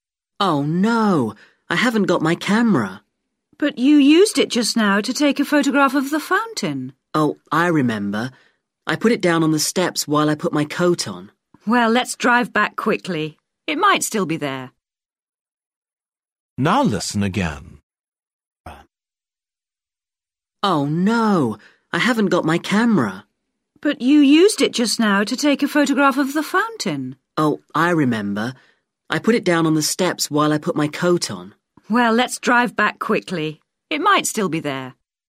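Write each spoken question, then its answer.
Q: Where did the man leave his camera?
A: On the steps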